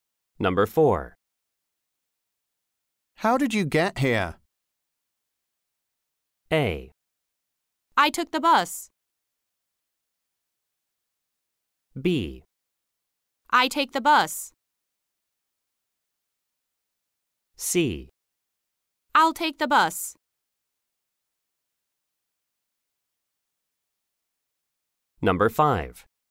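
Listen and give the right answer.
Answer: A: I took the bus.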